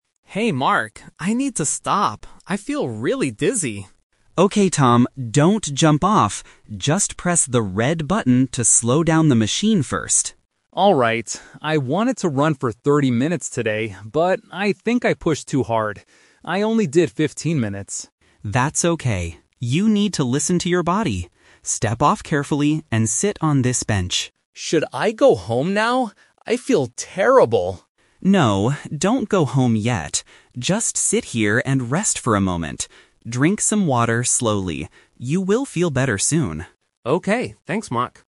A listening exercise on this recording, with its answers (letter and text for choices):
Listen to the conversation between a gym-goer and his personal trainer. Choose the correct answer (A, B, or C) for each question.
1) Why does Tom need to stop running?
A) He wants to go home.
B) He feels very dizzy.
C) He finished his workout.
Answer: B) He feels very dizzy.

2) How long did Tom originally want to run today?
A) 15 minutes.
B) 20 minutes.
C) 30 minutes.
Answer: C) 30 minutes.

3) What does Mark tell Tom to do right now?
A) Jump off the machine quickly.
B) Go home and sleep.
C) Sit on a bench and drink water.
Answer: C) Sit on a bench and drink water.

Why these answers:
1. Tom says at the beginning, "I need to stop. I feel really dizzy." Trap A is wrong: He asks about going home later, but that is not the reason he stops running. Trap C is wrong: He hasn't finished his planned workout yet; he has to stop early.
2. Tom explicitly says, "I wanted to run for 30 minutes today." Trap A is wrong (The Twist): 15 minutes is the time he actually ran before stopping, not what he wanted to run. Trap B is wrong: 20 minutes is not mentioned in the audio.
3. Mark instructs him to "sit on this bench" and "Drink some water slowly." Trap A is wrong (Action Trap): Mark strictly warns him, "Don't jump off!" Trap B is wrong (Action Trap): Tom asks if he should go home, but Mark says, "No, don't go home yet."

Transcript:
Tom: Hey Mark, I need to stop. I feel really dizzy.
Mark: Okay, Tom. Don't jump off! Just press the red button to slow down the machine first.
I wanted to run for 30 minutes today, but I think I pushed too hard. I only did 15 minutes.
Mark: That's okay. You need to listen to your body. Step off carefully and sit on this bench.
Tom: Should I go home now? I feel terrible.
Mark: No, don't go home yet. Just sit here and rest for a moment.